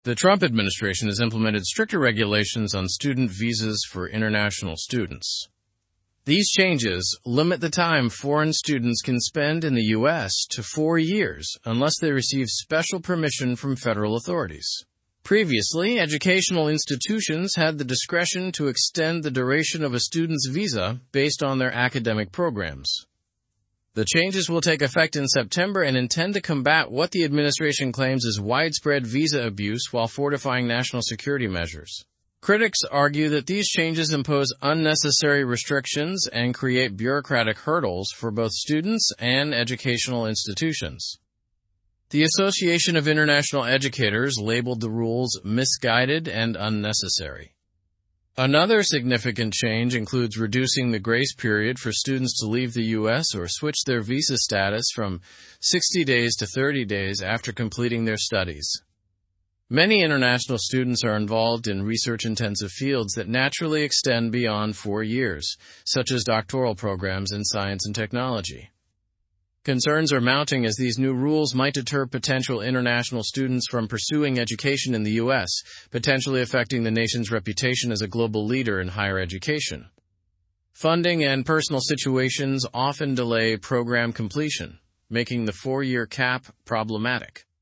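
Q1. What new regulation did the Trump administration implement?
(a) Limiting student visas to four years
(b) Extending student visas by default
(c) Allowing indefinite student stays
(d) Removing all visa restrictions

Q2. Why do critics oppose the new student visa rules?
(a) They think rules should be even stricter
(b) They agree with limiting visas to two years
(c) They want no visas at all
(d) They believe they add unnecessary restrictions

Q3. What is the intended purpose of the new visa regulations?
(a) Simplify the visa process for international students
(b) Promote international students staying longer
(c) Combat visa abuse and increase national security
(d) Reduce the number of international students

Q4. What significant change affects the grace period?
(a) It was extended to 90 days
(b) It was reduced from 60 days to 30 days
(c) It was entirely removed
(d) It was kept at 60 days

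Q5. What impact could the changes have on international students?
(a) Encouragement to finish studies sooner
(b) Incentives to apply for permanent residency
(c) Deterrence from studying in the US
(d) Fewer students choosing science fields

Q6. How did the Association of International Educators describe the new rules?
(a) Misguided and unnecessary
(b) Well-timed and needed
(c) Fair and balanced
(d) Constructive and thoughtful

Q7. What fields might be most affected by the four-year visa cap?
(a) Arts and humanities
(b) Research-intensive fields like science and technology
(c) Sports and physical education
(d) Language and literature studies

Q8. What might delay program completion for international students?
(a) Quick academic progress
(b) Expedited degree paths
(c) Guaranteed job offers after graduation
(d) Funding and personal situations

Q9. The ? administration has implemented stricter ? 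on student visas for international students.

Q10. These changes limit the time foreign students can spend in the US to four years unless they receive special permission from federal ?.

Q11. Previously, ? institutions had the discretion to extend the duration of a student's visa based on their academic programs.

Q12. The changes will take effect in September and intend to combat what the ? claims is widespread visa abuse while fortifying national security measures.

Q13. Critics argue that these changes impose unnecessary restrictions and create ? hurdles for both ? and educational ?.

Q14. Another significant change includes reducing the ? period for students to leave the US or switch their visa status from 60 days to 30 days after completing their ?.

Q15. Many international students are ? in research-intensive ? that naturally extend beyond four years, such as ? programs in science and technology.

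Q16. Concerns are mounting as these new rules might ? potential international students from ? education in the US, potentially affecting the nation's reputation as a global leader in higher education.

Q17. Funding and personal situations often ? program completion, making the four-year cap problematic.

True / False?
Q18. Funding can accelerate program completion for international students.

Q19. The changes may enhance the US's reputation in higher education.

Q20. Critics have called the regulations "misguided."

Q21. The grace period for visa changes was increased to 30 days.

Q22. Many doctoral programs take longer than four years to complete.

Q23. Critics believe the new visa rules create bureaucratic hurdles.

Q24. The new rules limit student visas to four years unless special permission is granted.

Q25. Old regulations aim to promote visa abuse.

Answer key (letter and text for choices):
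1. (a) Limiting student visas to four years
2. (d) They believe they add unnecessary restrictions
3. (c) Combat visa abuse and increase national security
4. (b) It was reduced from 60 days to 30 days
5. (c) Deterrence from studying in the US
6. (a) Misguided and unnecessary
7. (b) Research-intensive fields like science and technology
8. (d) Funding and personal situations
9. Trump, regulations
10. authorities
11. educational
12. administration
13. bureaucratic, students, institutions
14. grace, studies
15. involved, fields, doctoral
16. deter, pursuing
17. delay
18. False
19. False
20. True
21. False
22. True
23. True
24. True
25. False

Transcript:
The Trump administration has implemented stricter regulations on student visas for international students. These changes limit the time foreign students can spend in the US to four years unless they receive special permission from federal authorities. 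Previously, educational institutions had the discretion to extend the duration of a student's visa based on their academic programs.
The changes will take effect in September and intend to combat what the administration claims is widespread visa abuse while fortifying national security measures. Critics argue that these changes impose unnecessary restrictions and create bureaucratic hurdles for both students and educational institutions. The Association of International Educators labeled the rules "misguided and unnecessary."
Another significant change includes reducing the grace period for students to leave the US or switch their visa status from 60 days to 30 days after completing their studies. Many international students are involved in research-intensive fields that naturally extend beyond four years, such as doctoral programs in science and technology.
Concerns are mounting as these new rules might deter potential international students from pursuing education in the US, potentially affecting the nation's reputation as a global leader in higher education. 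Funding and personal situations often delay program completion, making the four-year cap problematic.

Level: Level 3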